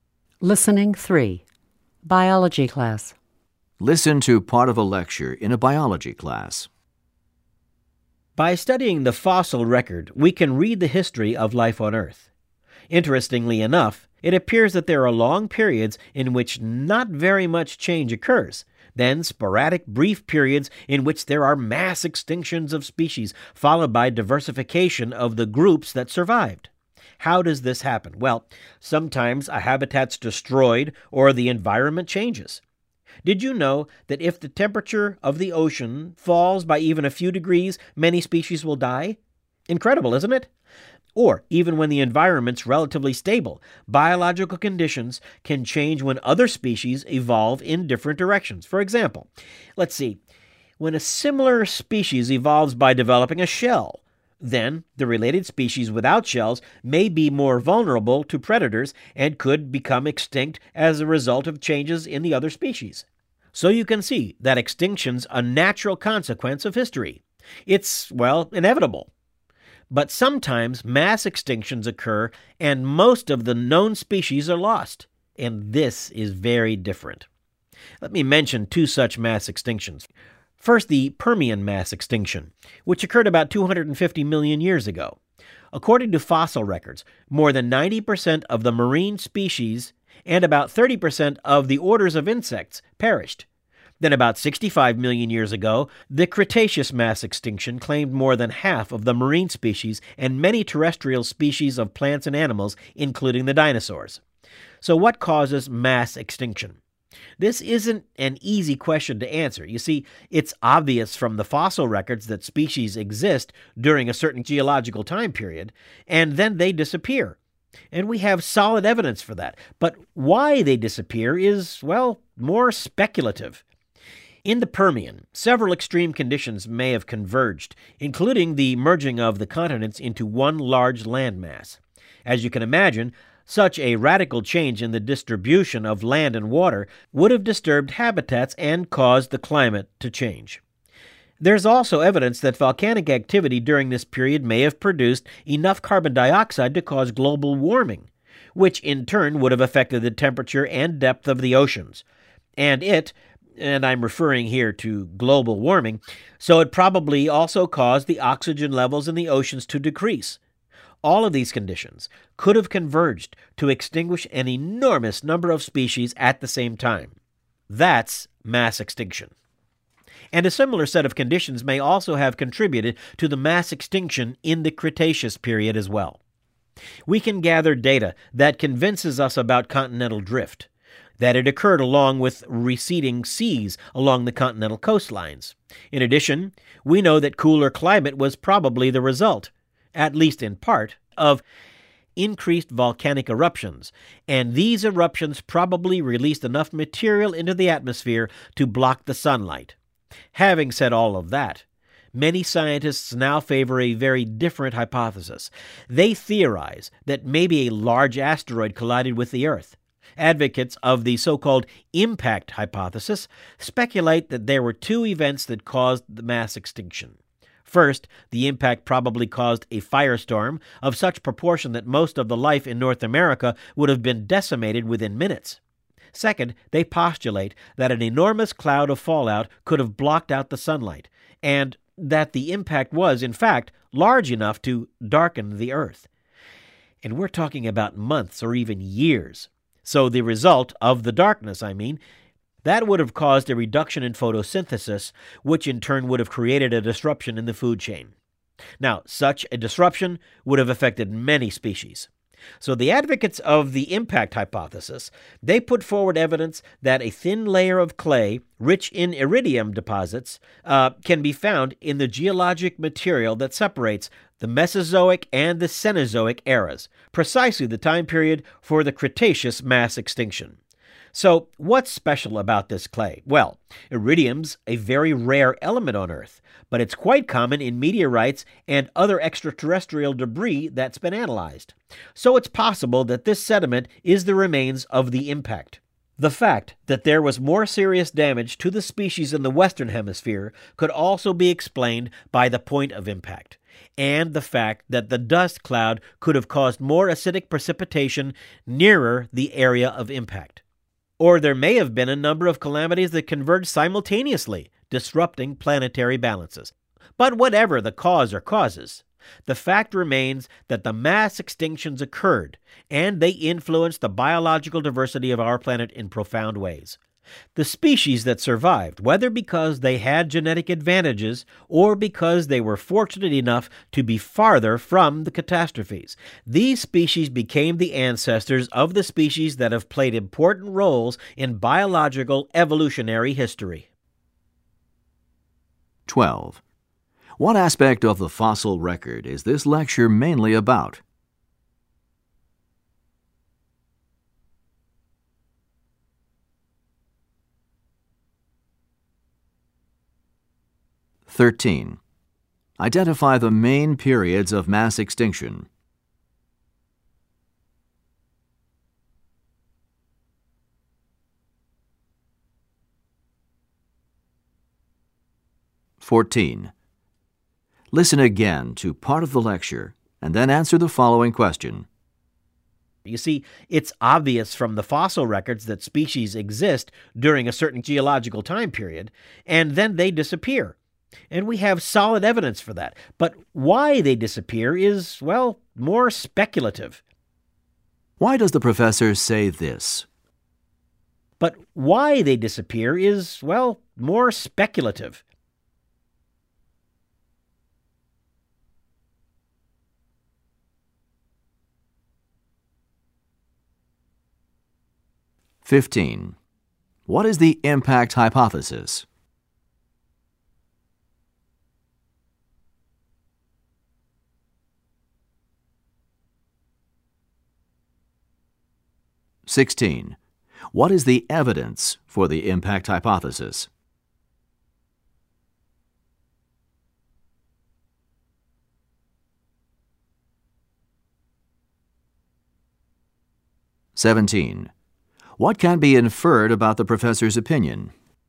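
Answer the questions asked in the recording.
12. Mass extinctions
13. The Permian and the Cretaceous
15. The theory that a large asteroid hit the Earth, causing mass extinction
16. A thin layer of clay rich in iridium from the time of the Cretaceous extinction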